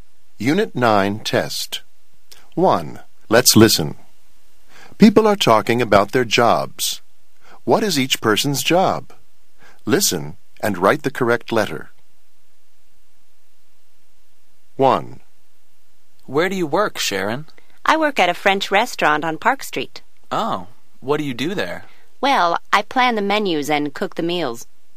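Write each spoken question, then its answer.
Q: What is each person's job?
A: a cook (chef)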